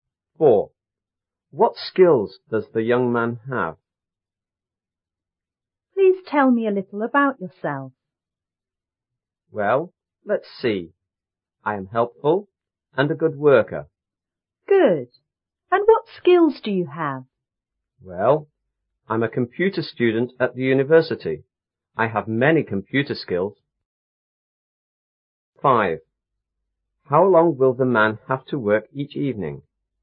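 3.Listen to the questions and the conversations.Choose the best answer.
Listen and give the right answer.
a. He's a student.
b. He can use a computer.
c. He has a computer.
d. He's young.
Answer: b. He can use a computer.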